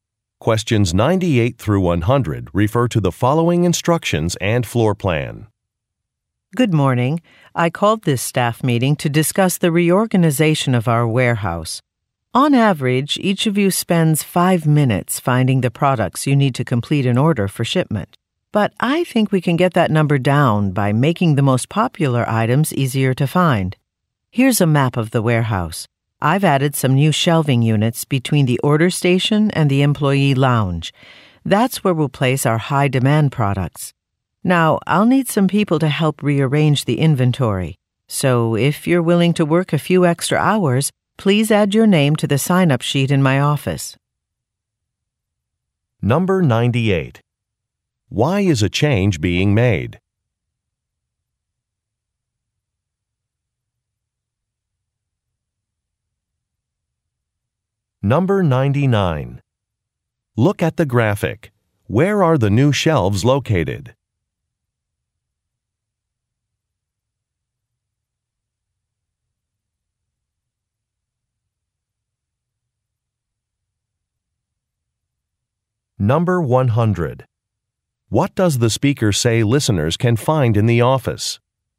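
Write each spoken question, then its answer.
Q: Why is a change being made?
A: To reduce the time spent finding products

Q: What does the speaker say listeners can find in the office?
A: A sign-up sheet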